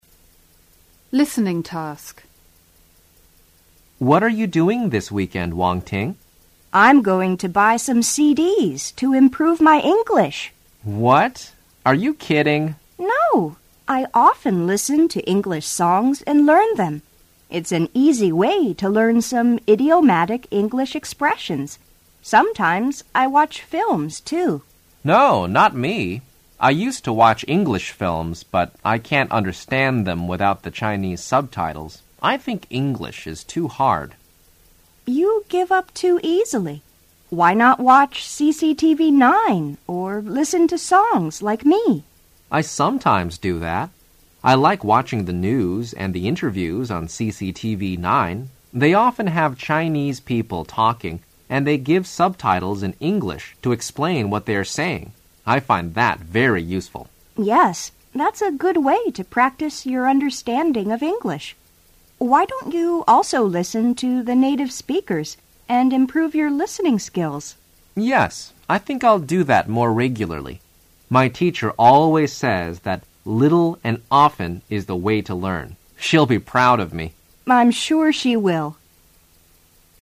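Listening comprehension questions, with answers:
3.Write down the three ways Wang Ting suggests to improve English skills.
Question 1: Listening to ___________ is an easy way to _____ some idiomatic __________.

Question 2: Watching _____________ __________ is a good way to ________ your ______ of English.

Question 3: Listening to ___________ can improve your _________.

2.Listen again and answer the following questions.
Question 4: What is Wang Ting going to do this weekend?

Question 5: What does Wang Ting think about listening to English songs?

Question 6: Did Chen Peng often watch English films? Does he watch them now?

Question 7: What does Chen Peng like watching on CCTV 9?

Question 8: What does Wang Ting ask Chen Peng to do?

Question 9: What does Chen Peng's teacher say about learning English? What does she mean?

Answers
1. English songs; learn; English expressions
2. CCTV 9; practice; understanding
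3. native speakers; listening skills
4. Buy some CDs to improve her English.
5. It's an easy way to learn some idiomatic English expressions.
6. Yes, he used to, but he doesn't now because he can't understand them without Chinese subtitles.
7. The news and the interviews.
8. Listen to native speakers to improve his listening skills.
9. Little and often is the way to learn; practise a little regularly.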